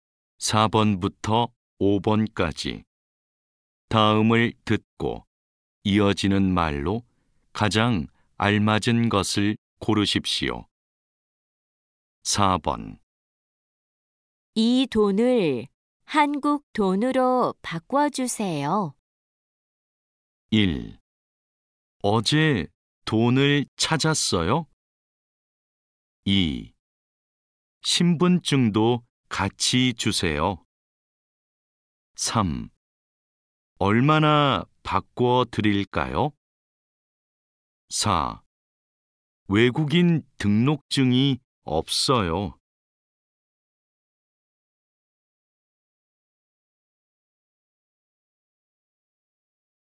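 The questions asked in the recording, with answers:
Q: 이 돈을 한국 돈으로 바꿔주세요.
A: 3: 얼마나 바꿔 드릴까요?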